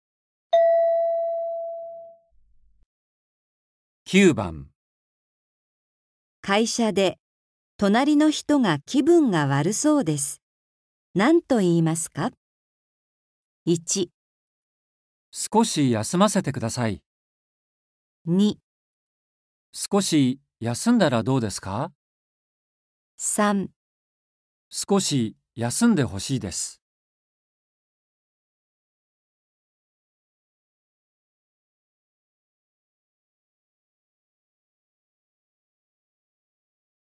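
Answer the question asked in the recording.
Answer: 2

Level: N4.35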